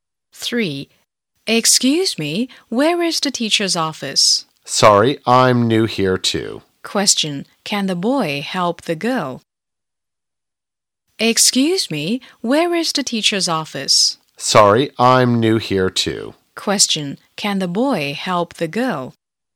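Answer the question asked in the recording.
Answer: No, he can't; he's new there too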